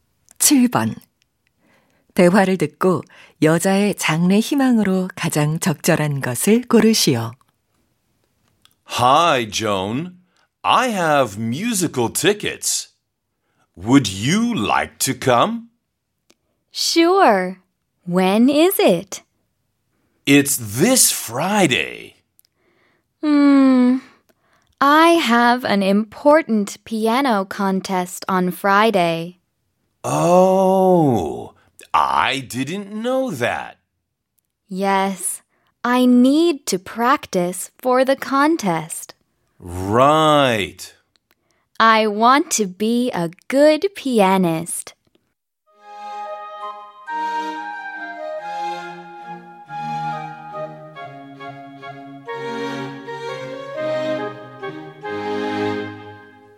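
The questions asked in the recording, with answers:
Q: 대화를 듣고 여자의 장래 희망으로 가장 적절한 것을 고르시오.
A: 피아니스트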